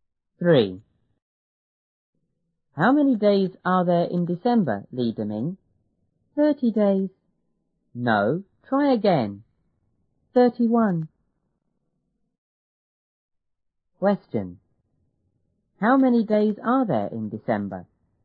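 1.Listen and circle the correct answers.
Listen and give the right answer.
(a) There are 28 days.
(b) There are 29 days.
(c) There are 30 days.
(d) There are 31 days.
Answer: (d) There are 31 days.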